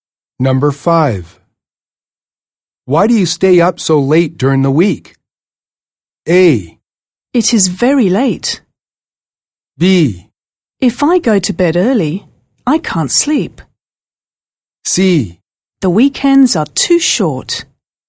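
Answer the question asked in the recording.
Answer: B: If I go to bed early, I can't sleep.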